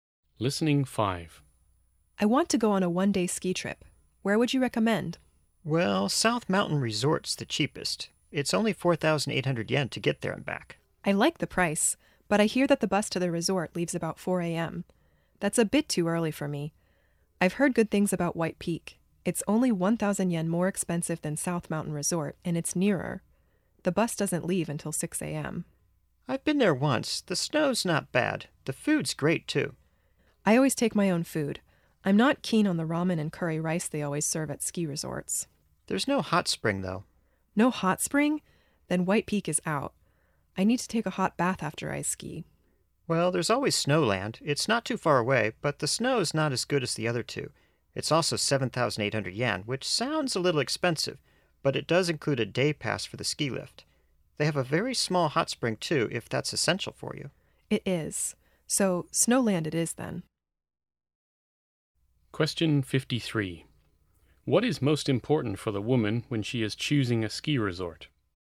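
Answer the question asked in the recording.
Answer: Having a hot spring.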